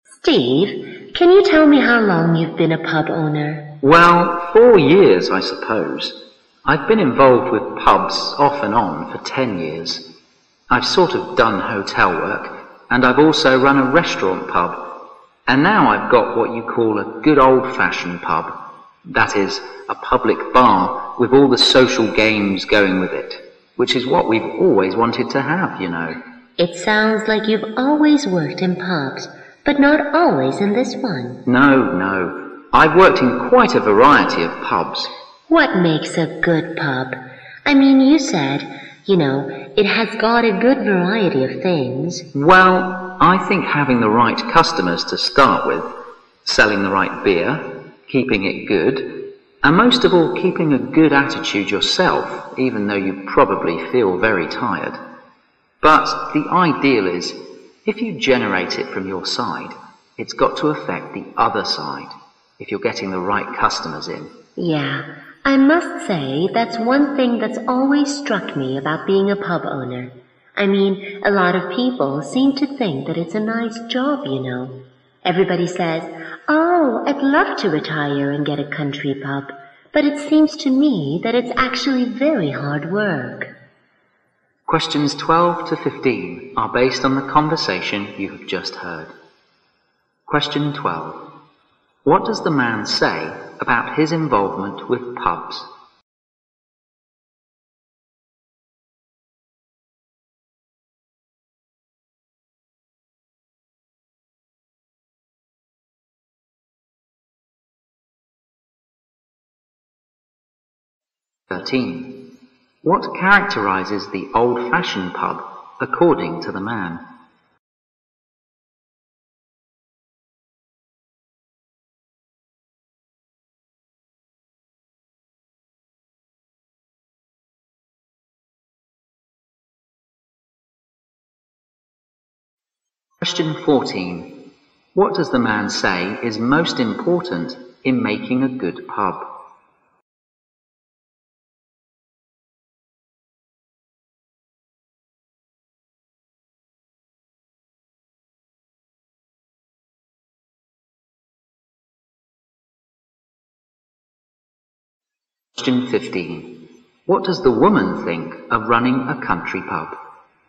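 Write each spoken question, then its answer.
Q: What does the man say about his involvement with pubs?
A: He has been involved with pubs off and on for 10 years, in a variety of pubs, and has owned one for 4 years.

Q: What characterizes the old-fashioned pub according to the man?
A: A public bar with all the social games that go with it.

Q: What does the man say is most important in making a good pub?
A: Keeping a good attitude yourself.

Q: What does the woman think of running a country pub?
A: It is actually very hard work.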